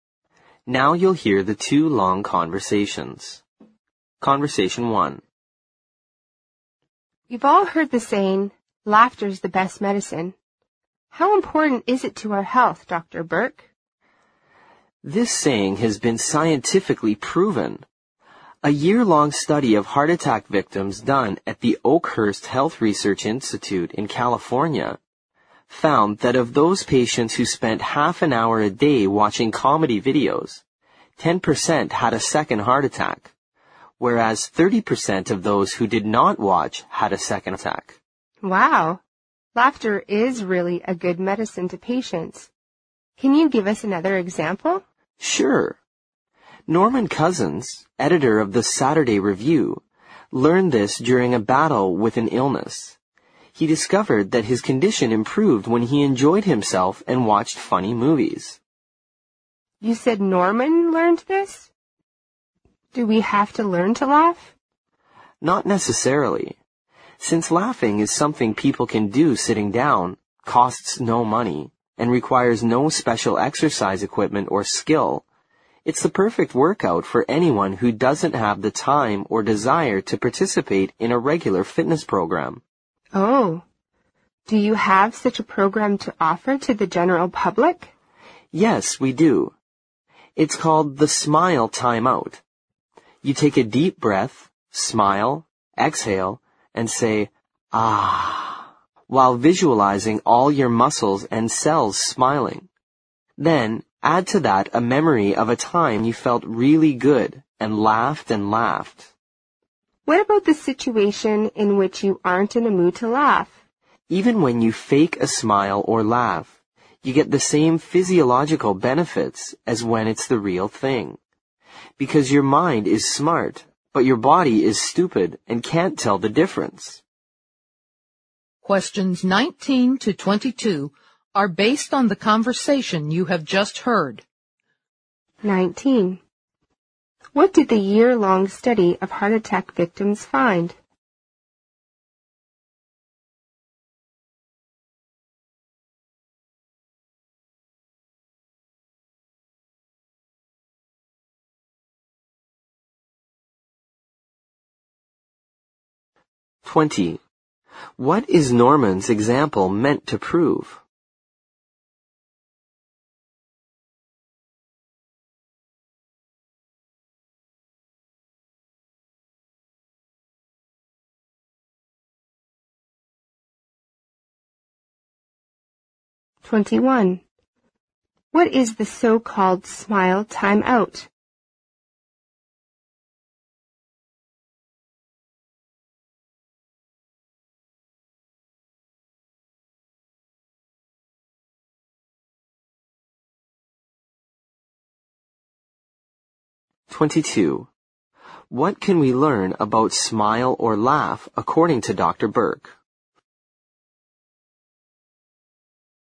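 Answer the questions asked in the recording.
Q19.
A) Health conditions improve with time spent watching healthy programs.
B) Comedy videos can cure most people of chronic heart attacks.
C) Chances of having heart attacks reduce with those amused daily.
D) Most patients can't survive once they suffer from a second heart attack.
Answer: C) Chances of having heart attacks reduce with those amused daily.
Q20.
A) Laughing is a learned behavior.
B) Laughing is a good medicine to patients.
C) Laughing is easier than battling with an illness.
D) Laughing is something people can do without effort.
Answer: B) Laughing is a good medicine to patients.
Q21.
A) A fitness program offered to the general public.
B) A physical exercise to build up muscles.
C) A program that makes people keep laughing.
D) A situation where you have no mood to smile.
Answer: A) A fitness program offered to the general public.
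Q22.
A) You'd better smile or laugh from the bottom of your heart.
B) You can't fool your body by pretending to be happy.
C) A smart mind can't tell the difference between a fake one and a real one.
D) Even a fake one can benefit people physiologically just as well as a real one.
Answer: D) Even a fake one can benefit people physiologically just as well as a real one.

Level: 六级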